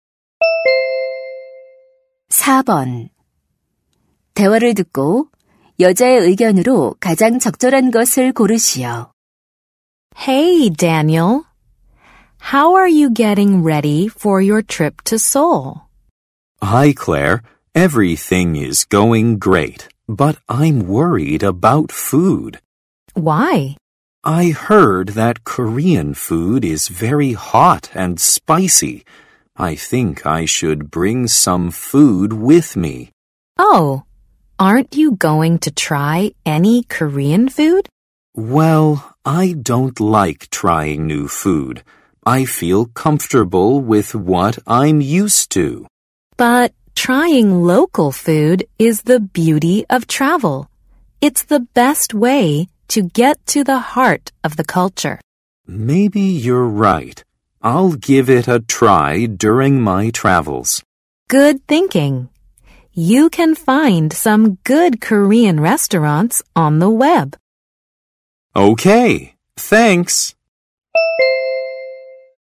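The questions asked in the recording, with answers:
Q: 대화를 듣고 여자의 의견으로 가장 적절한 것을 고르시오.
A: 여행 중에는 현지 음식을 먹어 보는 것이 좋다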